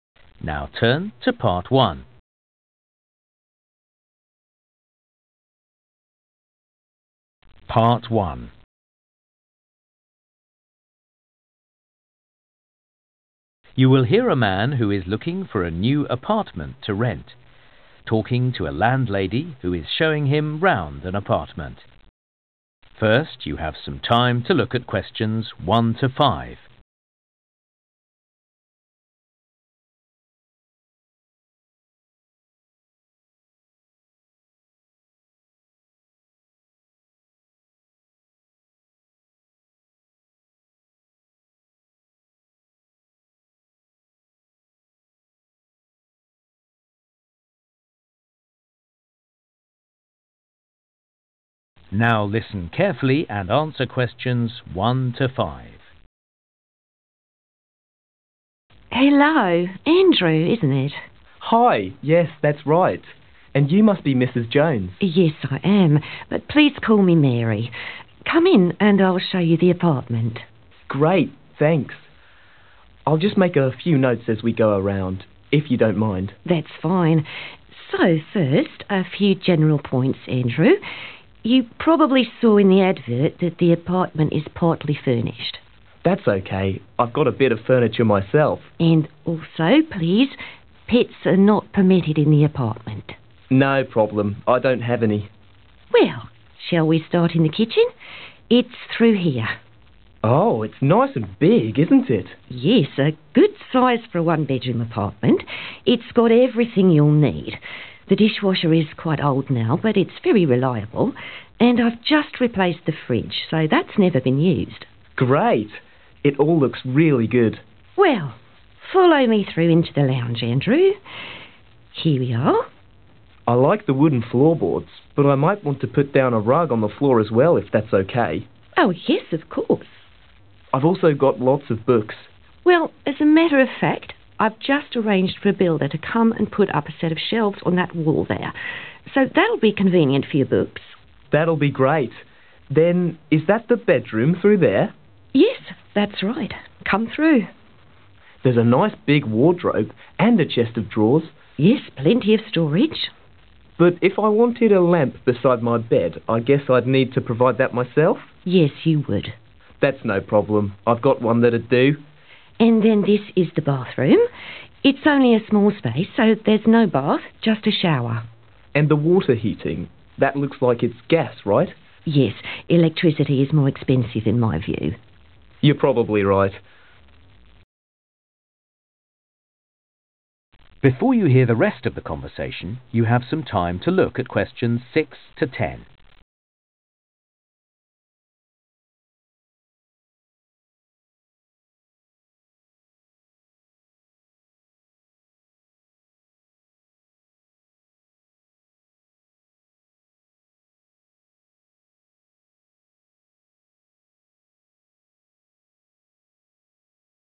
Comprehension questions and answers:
Questions 1-5. Complete the notes below. Write NO MORE THAN ONE WORD for each answer.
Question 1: no 1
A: pets

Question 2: there is a new 2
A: fridge

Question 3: some 3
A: shelves

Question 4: need to bring a 4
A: lamp

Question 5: the water is heated by 5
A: gas

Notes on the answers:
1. pets are not permitted (= allowed) in the apartment. (thú cưng không được phép nuôi trong chung cư)
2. And I've just replaced (= new) the fridge (Và tôi mới thay tủ lạnh), so that's never been used.
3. I've just arranged for a builder to come and put up (= built) a set of shelves on that wall there. (tôi vừa sắp xếp để một người thợ xây đến và dựng một bộ kệ trên bức tường đó)
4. But if I wanted a lamp beside my bed, I guess I'd need to provide that myself (= need to bring)? (Nhưng nếu tôi muốn có một chiếc đèn cạnh giường mình, tôi đoán rằng tôi cần phải tự mang theo)